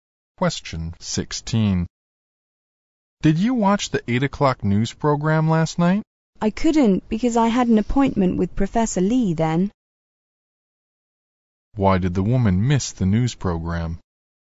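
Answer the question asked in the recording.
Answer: She had an appointment with Professor Lee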